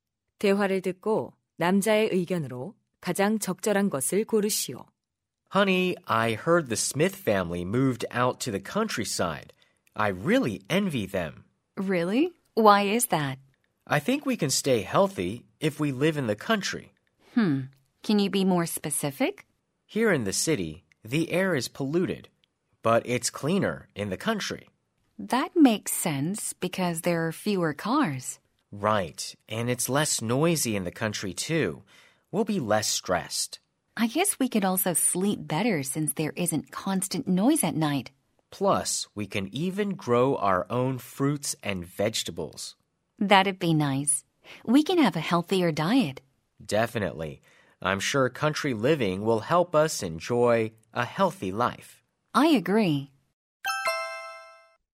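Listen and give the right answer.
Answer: 시골 생활은 건강한 삶에 도움이 된다.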